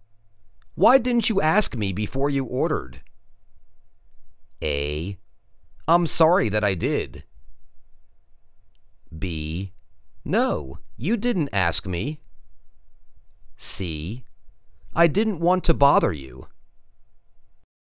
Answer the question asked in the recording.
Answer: I didn't want to bother you.